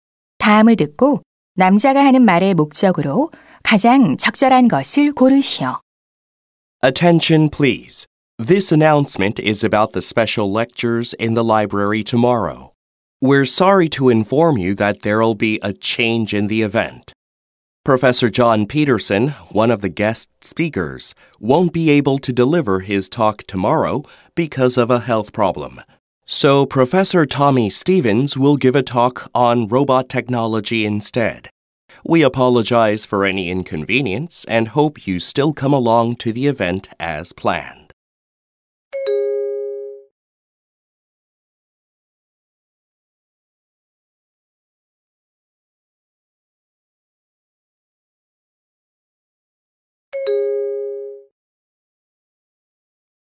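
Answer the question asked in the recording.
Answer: 특강 연사 변경을 알리려고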